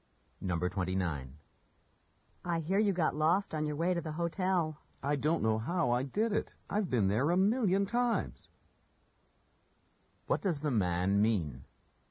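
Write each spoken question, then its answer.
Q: What does the man mean?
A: He was surprised he got lost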